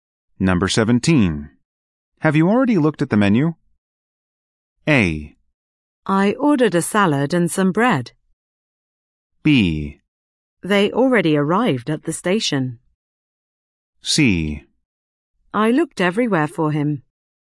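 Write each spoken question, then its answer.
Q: Have you already looked at the menu?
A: A: I ordered a salad and some bread.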